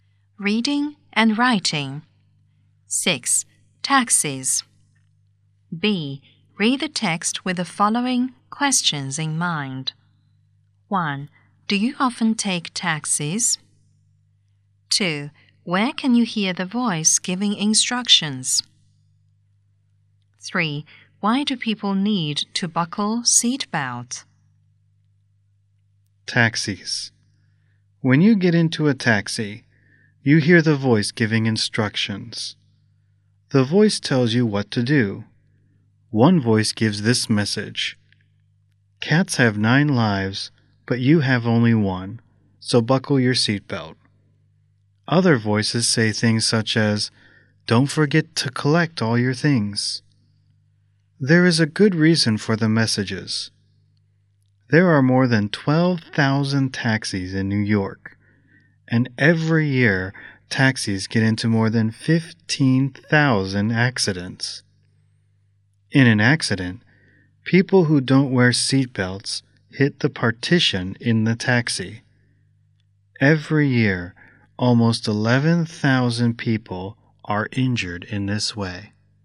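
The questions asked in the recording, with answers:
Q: Where can you hear the voice giving instructions?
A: In a taxi, when you get into it

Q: Why do people need to buckle seat belts?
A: Because taxis have many accidents, and people without seat belts hit the partition and get injured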